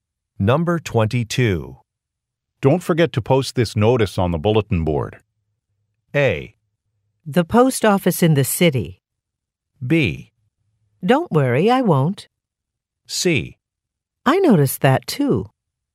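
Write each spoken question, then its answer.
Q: Don't forget to post this notice on the bulletin board.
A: B: Don't worry, I won't.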